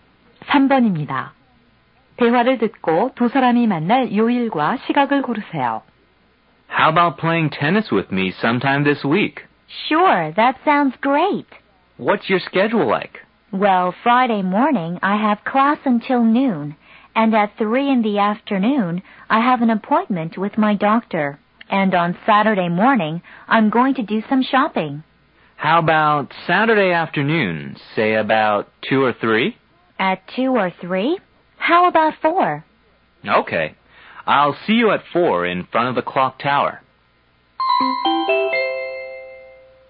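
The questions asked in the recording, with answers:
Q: 대화를 듣고 두 사람이 만날 요일과 시각을 고르세요.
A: 토요일 4시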